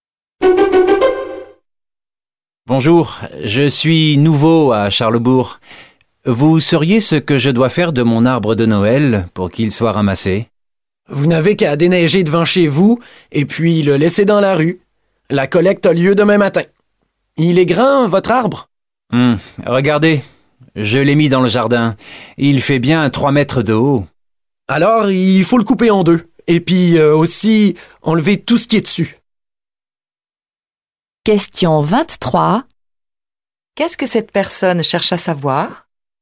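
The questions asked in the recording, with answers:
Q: Qu'est-ce que cette personne cherche à savoir?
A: Comment faire ramasser son arbre de Noël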